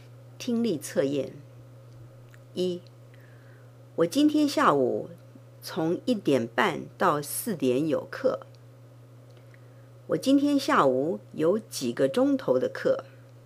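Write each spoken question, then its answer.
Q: 我今天下午有几个钟头的课?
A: 两个半钟头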